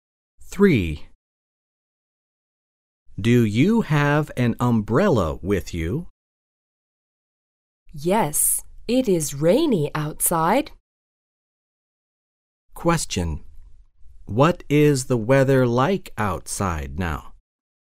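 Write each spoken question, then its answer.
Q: What is the weather like outside now?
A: Rainy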